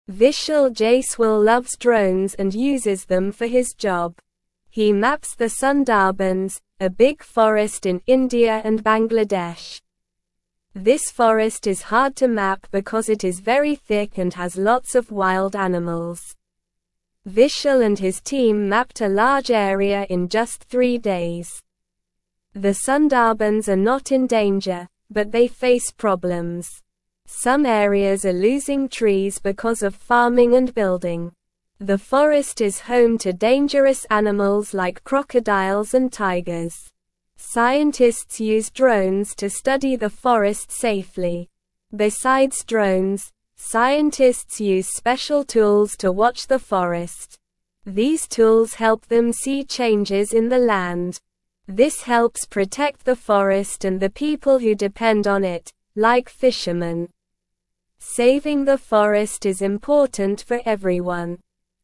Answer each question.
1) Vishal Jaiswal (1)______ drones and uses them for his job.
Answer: loves

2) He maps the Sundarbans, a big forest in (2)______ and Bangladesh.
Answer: India

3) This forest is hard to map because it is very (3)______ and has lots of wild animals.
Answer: thick

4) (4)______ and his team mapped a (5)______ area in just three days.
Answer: Vishal

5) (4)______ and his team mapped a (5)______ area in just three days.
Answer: large

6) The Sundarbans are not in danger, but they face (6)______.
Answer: problems

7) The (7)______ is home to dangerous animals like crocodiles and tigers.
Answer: forest

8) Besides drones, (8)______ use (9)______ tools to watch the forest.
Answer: scientists

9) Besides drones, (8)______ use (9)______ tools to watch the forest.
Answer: special

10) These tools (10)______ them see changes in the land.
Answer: help

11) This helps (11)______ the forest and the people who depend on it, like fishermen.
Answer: protect

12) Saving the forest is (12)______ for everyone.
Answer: important

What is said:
Vishal Jaiswal loves drones and uses them for his job. He maps the Sundarbans, a big forest in India and Bangladesh. This forest is hard to map because it is very thick and has lots of wild animals. Vishal and his team mapped a large area in just three days.
The Sundarbans are not in danger, but they face problems. Some areas are losing trees because of farming and building. The forest is home to dangerous animals like crocodiles and tigers. Scientists use drones to study the forest safely.
Besides drones, scientists use special tools to watch the forest. These tools help them see changes in the land. This helps protect the forest and the people who depend on it, like fishermen. Saving the forest is important for everyone.

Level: Level 2